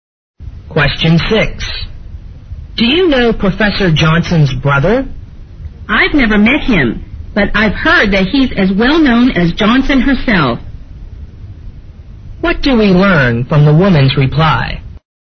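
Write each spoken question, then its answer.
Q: What do we learn from the woman's reply?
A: Professor Johnson's brother is as famous as she is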